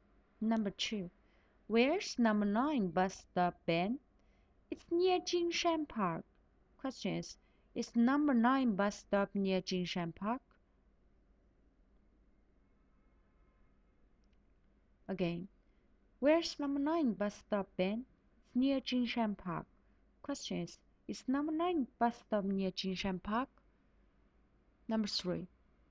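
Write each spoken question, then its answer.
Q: is number 9 bus stop near Jingshan Park?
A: Yes, it is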